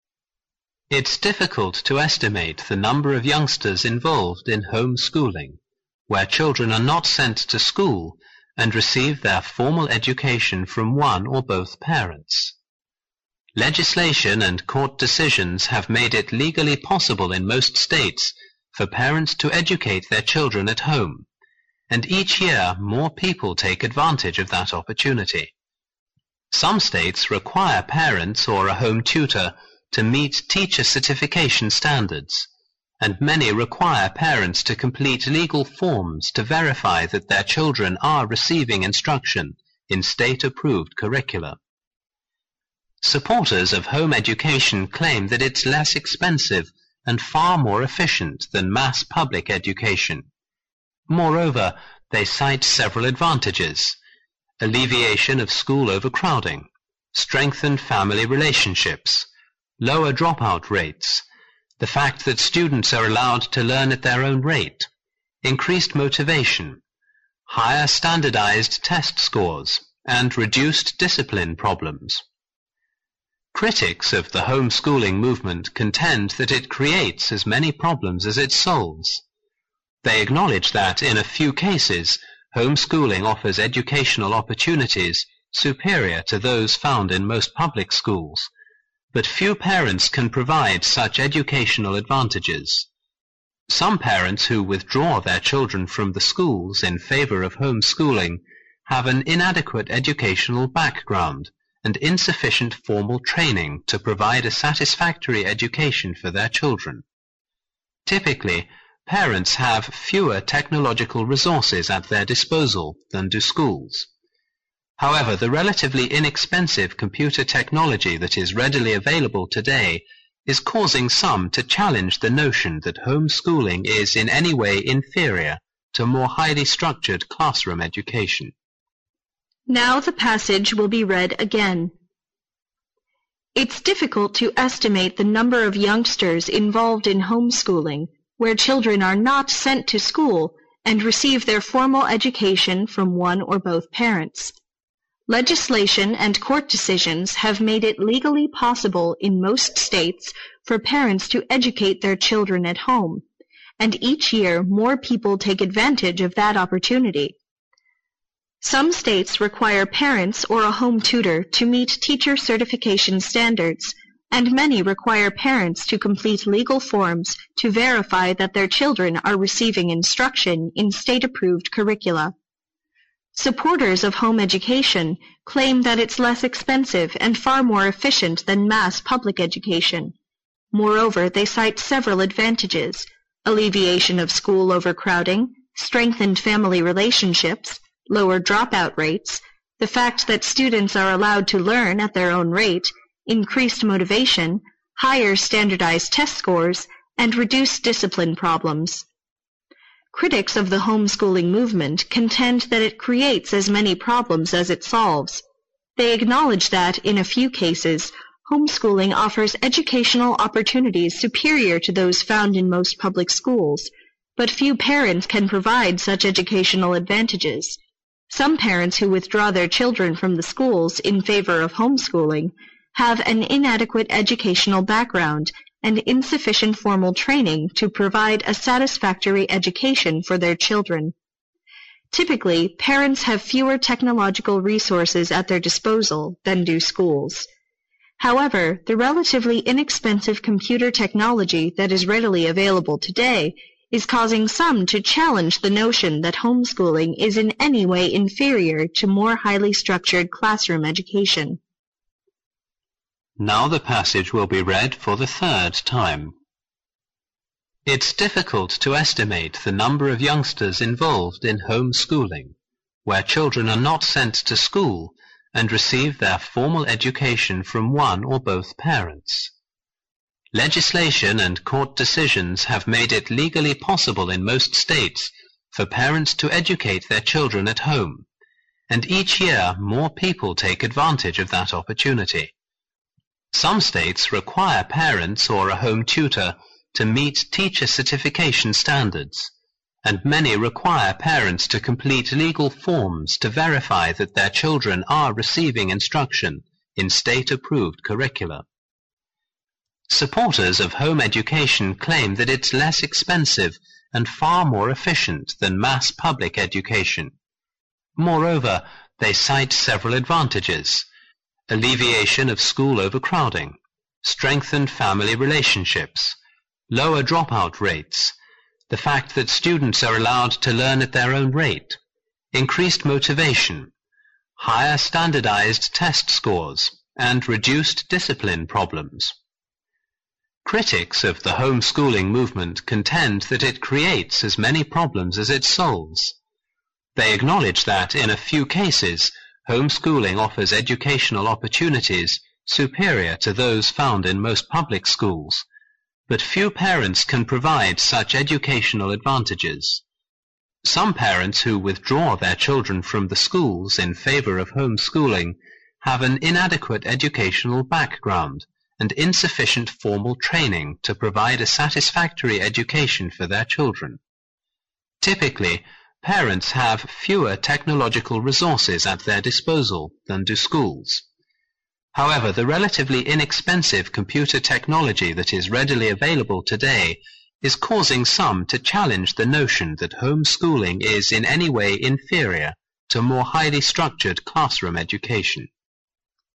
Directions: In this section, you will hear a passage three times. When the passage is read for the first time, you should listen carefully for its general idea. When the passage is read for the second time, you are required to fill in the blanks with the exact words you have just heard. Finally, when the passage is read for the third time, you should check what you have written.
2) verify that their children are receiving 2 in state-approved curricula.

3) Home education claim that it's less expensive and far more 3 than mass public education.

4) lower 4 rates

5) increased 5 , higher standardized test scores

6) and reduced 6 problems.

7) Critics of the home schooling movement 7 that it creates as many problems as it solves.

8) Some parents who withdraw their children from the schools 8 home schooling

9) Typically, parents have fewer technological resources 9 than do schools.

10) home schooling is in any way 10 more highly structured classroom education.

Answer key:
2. instruction
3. efficient
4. dropout
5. motivation
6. discipline
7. contend
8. in favor of
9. at their disposal
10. inferior to

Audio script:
It's difficult to estimate the number of youngsters involved in home schooling, where children are not sent to school and receive their formal education from one or both parents. 1 and court decisions have made it legally possible in most states for parents to educate their children at home, and each year more people take advantage of that opportunity. Some states require parents or a home tutor to meet teacher certification standards, and many require parents to complete legal forms to verify that their children are receiving 2 in state-approved curricula.
Some states require parents or a home tutor to meet teacher certification standards, and many require parents to complete legal forms to verify that their children are receiving instruction in state approved curriculum. Supporters of home education claim that it is less expensive and far more efficient than mass public education. Moreover, they site several advantages: alleviation of school overcrowding, strengthen family relationships, lower dropout rates, the facts that students are allowed to learn at their own rate, increased motivation, higher standardized test scores, and reduced discipline problems. Critics of the home schooling movement content that it creates as many problems as it solves. They acknowledge that, in a few cases, home schooling offers educational opportunities superior to those found in most public schools, but few parents can provide such educational advantages. Some parents who withdraw their children from the schools in favor of home schooling have an inadequate educational background and insufficient formal training to provide a satisfactory education for their children. Typically, parents have fewer technological resources at their disposal than do schools. However, the relatively inexpensive computer technology that is readily available today is causing some to challenge the notion that home schooling is in any way inferior to more highly structured classroom education.